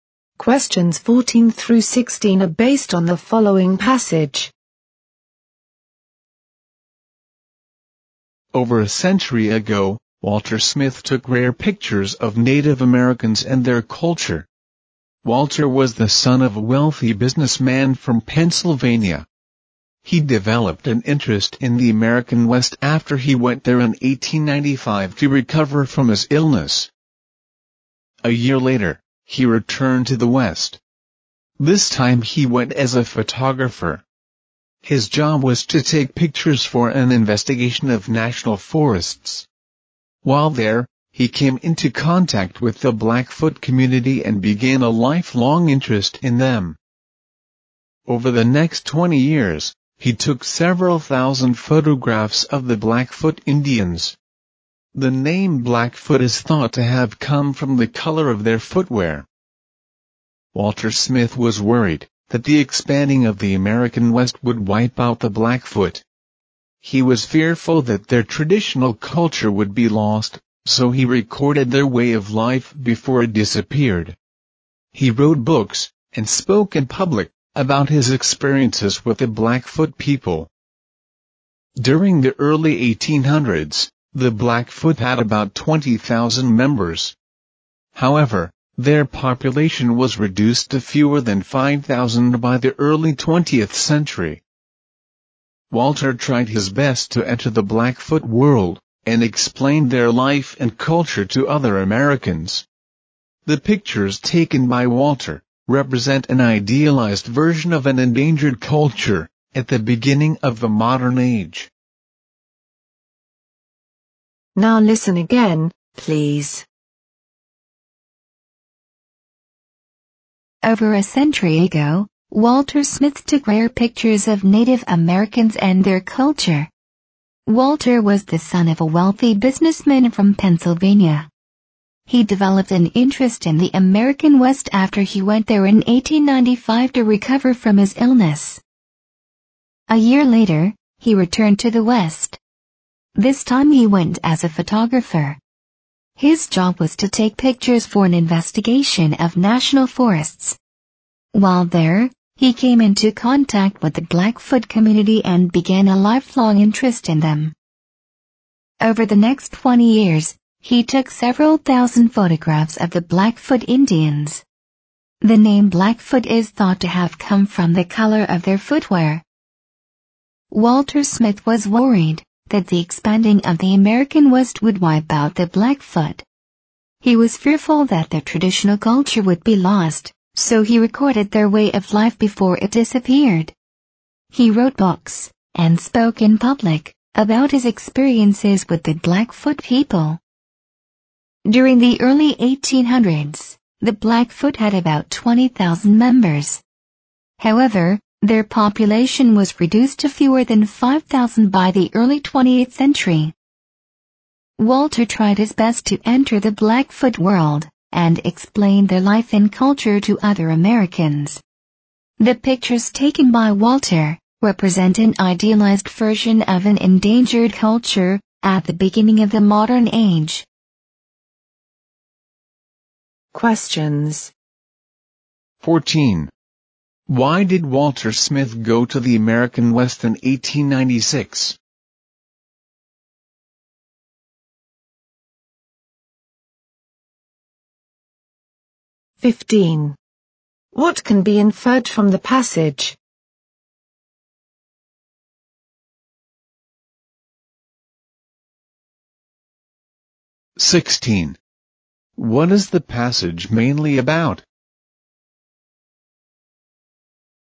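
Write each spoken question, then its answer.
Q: Why did Walter Smith go to the American West in 1896?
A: To take photographs for an investigation of national forests.

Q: What is the passage mainly about?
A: Walter Smith's photographs recording the Blackfoot people and their culture.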